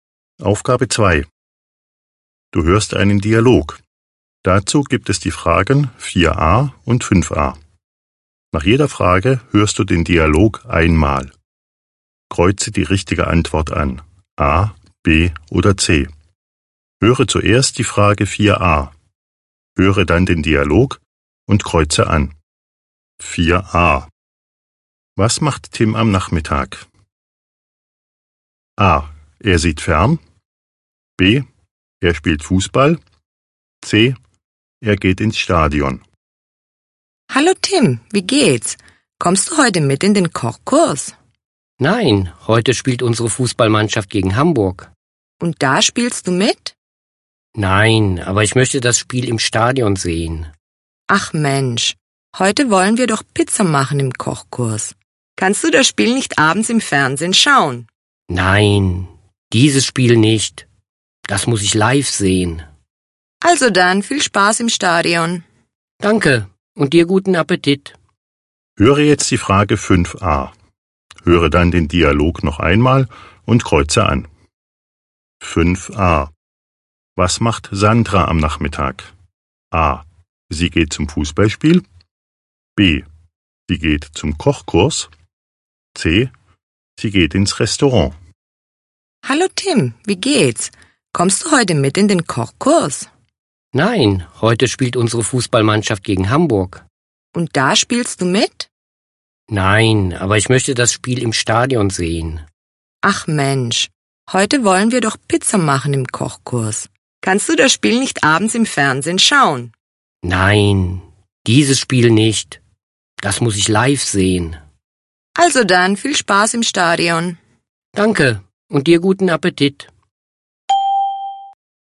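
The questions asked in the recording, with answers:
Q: Was macht Tim am Nachmittag?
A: C: Er geht ins Stadion.

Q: Was macht Sandra am Nachmittag?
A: B: Sie geht zum Kochkurs.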